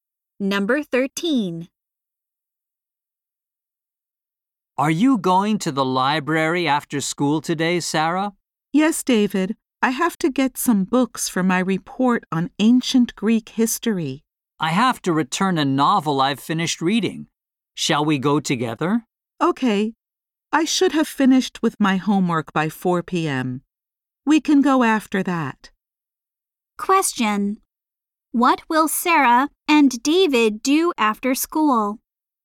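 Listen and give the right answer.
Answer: Go to the library together.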